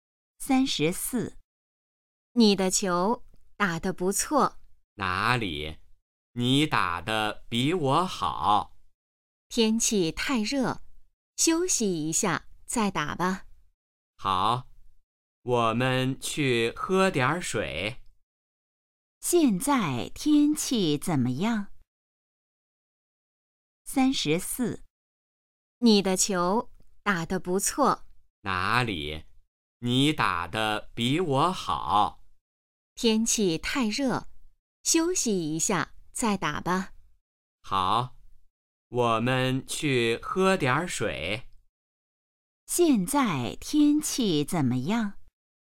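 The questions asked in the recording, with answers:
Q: 现在天气怎么样?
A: 太热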